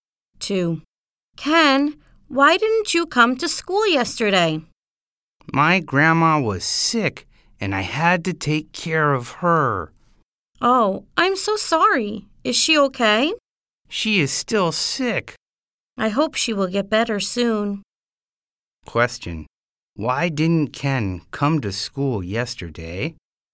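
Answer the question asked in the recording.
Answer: His grandma was sick and he had to take care of her.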